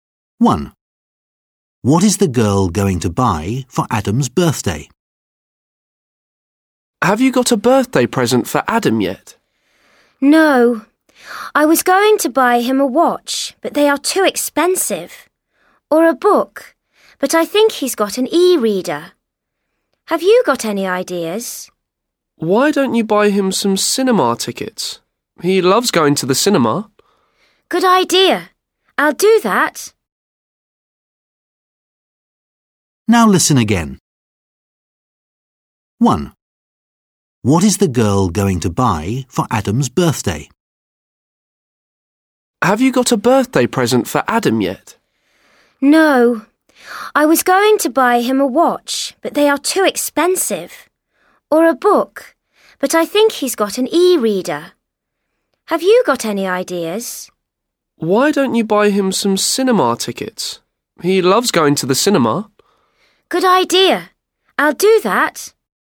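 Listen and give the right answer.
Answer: cinema tickets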